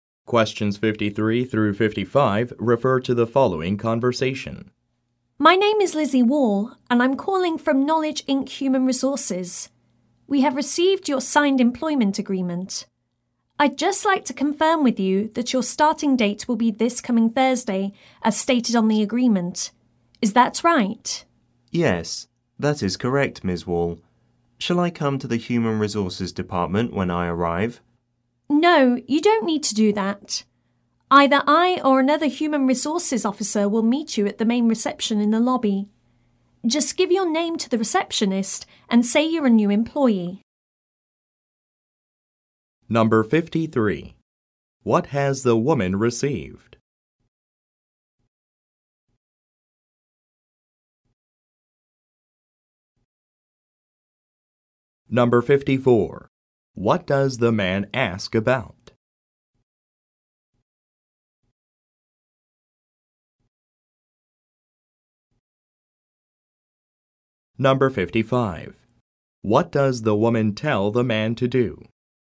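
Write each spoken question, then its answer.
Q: What has the woman received?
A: A signed employment agreement

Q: What does the man ask about?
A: Whether he should go to the Human Resources Department when he arrives

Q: What does the woman tell the man to do?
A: Give his name to the receptionist and say he is a new employee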